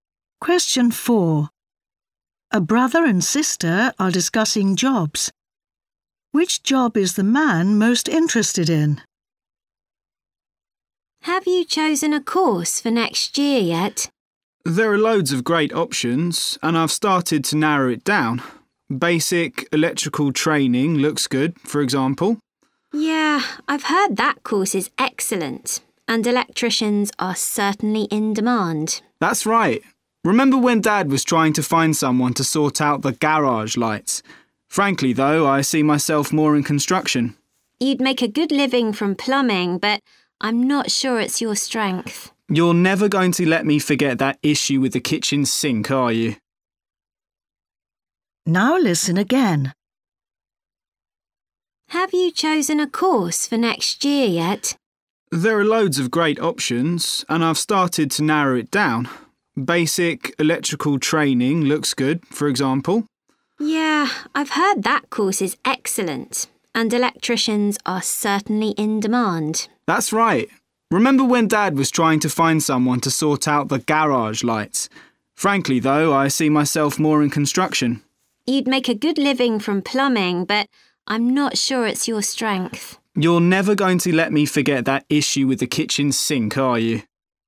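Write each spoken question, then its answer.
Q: Which job is the man most interested in?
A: construction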